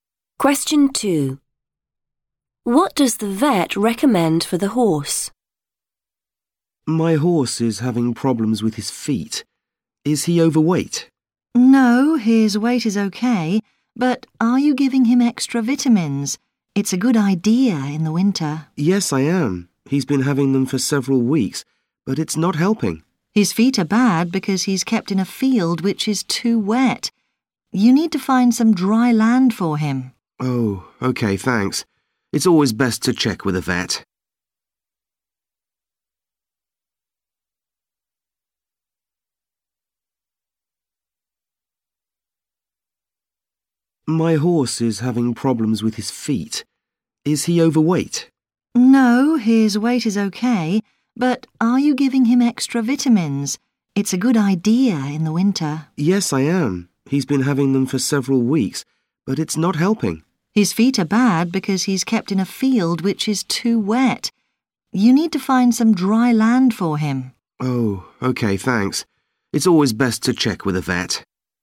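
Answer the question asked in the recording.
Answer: Find some dry land for him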